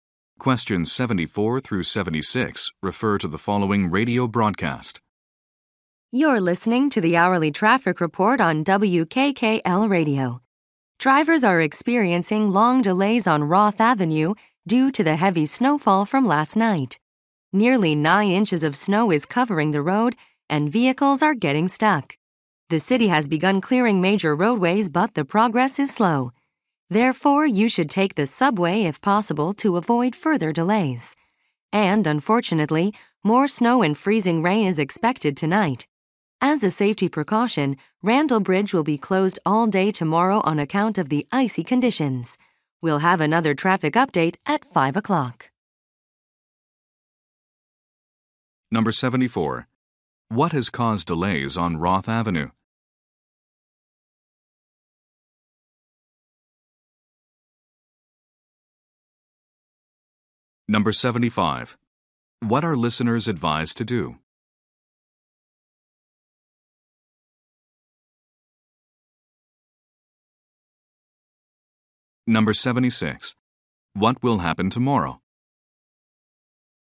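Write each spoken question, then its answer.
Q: What has caused delays on Roth Avenue?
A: Heavy snowfall

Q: What are listeners advised to do?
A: Take the subway

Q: What will happen tomorrow?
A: Randall Bridge will be closed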